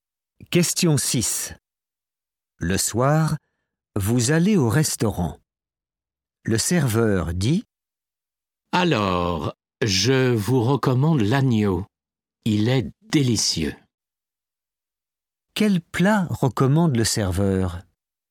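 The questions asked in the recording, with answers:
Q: Quel plat recommande le serveur?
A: l'agneau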